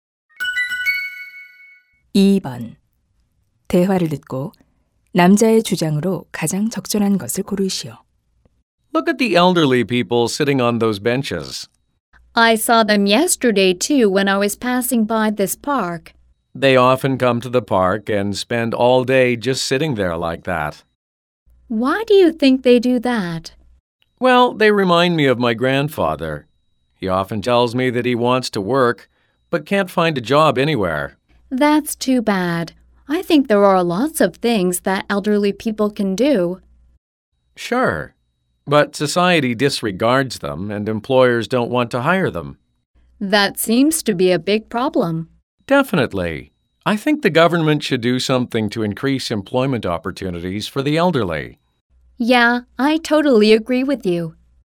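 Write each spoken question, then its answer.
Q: 대화를 듣고 남자의 주장으로 가장 적절한 것을 고르시오.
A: 정부는 노인 고용 기회를 늘려야 한다.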